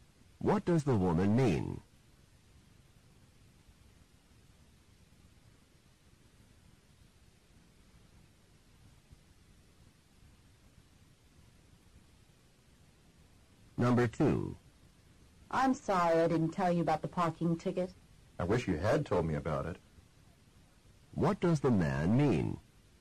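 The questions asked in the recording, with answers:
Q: What does the man mean?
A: The woman did not tell him about the ticket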